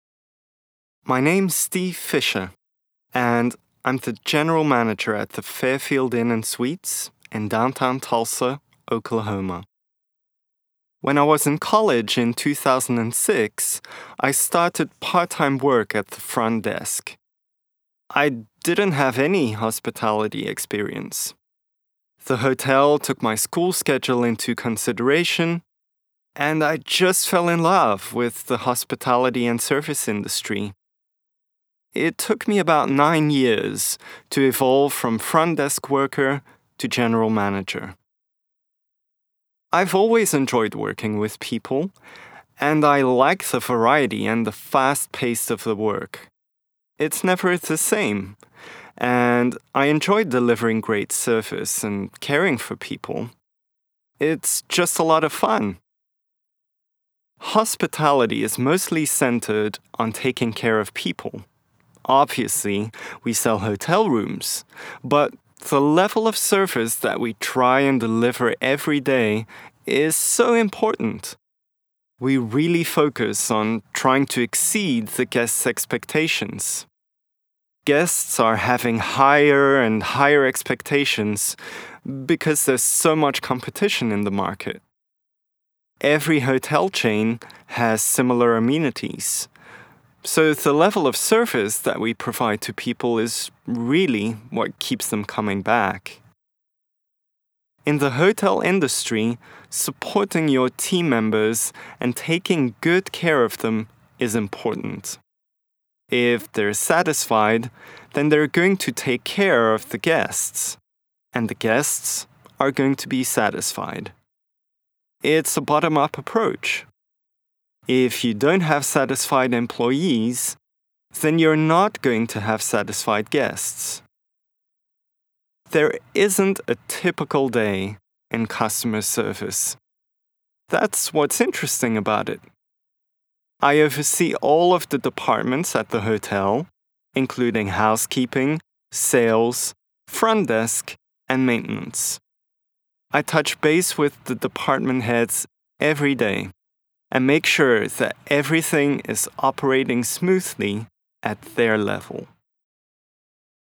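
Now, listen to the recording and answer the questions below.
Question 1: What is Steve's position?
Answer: General manager at the Fairfield Inn and Suites in downtown Tulsa

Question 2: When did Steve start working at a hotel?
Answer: In 2006, when he was in college

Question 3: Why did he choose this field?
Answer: The hotel accommodated his school schedule and he fell in love with hospitality

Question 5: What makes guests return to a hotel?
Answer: The level of service provided

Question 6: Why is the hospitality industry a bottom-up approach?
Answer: Satisfied employees take care of guests, so guests are satisfied

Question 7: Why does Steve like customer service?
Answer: There isn't a typical day; it's never the same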